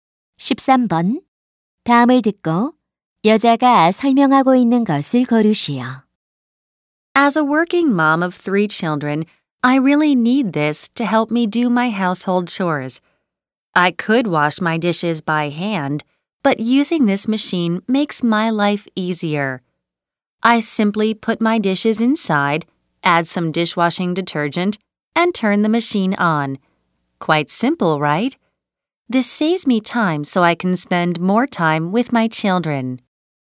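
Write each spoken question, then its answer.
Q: 다음을 듣고 여자가 설명하고 있는 것을 고르시오.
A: 식기세척기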